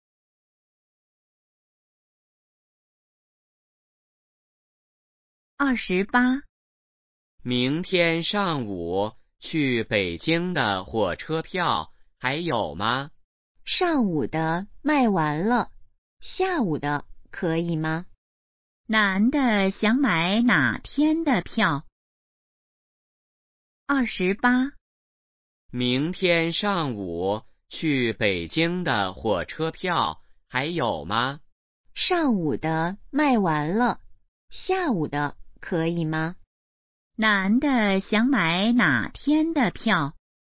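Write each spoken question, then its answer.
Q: 男的想买哪天的票?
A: 明天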